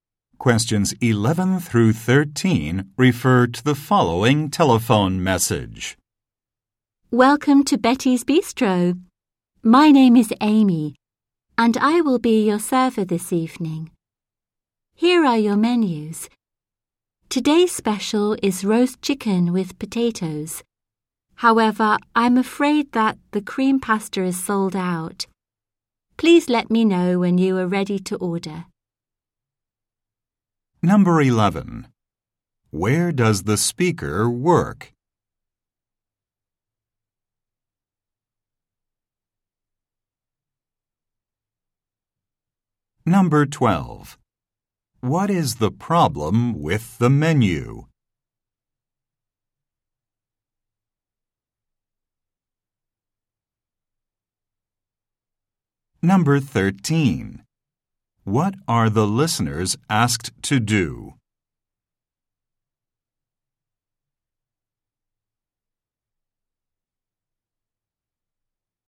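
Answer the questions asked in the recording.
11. At a restaurant (Betty's Bistro)
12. The cream pasta is sold out
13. Let her know when they are ready to order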